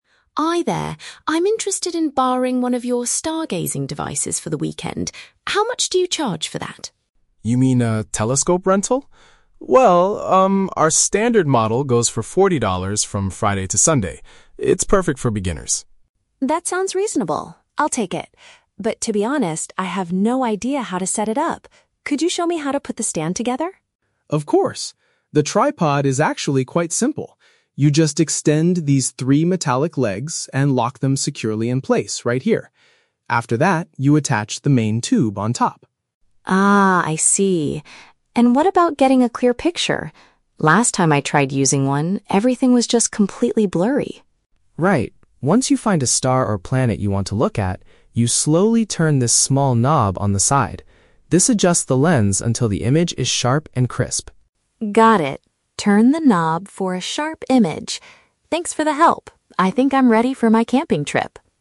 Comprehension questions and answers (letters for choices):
Listen to the conversation between a customer and a store owner. Choose the correct answer (A, B, or C) for each question.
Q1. What is the customer's main purpose at the store?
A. To buy a brand-new stargazing device.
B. To pay for the temporary use of a telescope.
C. To ask for a refund for a damaged item.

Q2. What does the customer need help with regarding the stand?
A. She needs instructions on how to assemble the base.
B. She wants to know what material the legs are made of.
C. She asks the owner to help her carry it to her car.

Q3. What should the customer do to make the image clear?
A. Replace the old lens with a new one.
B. Lock the three metallic legs firmly in place.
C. Rotate a small mechanical part on the device.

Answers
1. B
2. A
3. C

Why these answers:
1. The customer says she is interested in "borrowing... for the weekend," which the owner confirms is a "telescope rental." This paraphrases to "temporary use of a telescope." Option (A) is The Trap: She wants to borrow/rent, not buy a new one. Option (C) is not mentioned.
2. The customer asks, "Could you show me how to put the stand together?" ("put the stand together" = "assemble the base"). Option (B) is The Trap: The owner mentions "metallic legs" (material), but the customer never asked about what they were made of. Option (C) is plausible but not mentioned.
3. The owner tells her to "turn this small knob on the side" to make the image "sharp and crisp" (clear). "Turn a knob" is perfectly paraphrased as "rotate a small mechanical part." Option (A) is not mentioned. Option (B) is The Trap: Locking the metallic legs is the instruction for assembling the tripod, not for fixing a blurry image.

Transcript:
Customer: Hi there, I'm interested in borrowing one of your stargazing devices for the weekend. How much do you charge for that?
Store Owner: You mean a telescope rental? Well, um, our standard model goes for forty dollars from Friday to Sunday. It's perfect for beginners.
Customer: That sounds reasonable. I'll take it. But, to be honest, I have no idea how to set it up. Could you show me how to put the stand together?
Store Owner: Of course. The tripod is actually quite simple. You just extend these three metallic legs and lock them securely in place right here. After that, you attach the main tube on top.
Customer: Ah, I see. And what about getting a clear picture? Last time I tried using one, everything was just completely blurry.
Store Owner: Right. Once you find a star or planet you want to look at, you slowly turn this small knob on the side. This adjusts the lens until the image is sharp and crisp.
Customer: Got it. Turn the knob for a sharp image. Thanks for the help, I think I'm ready for my camping trip!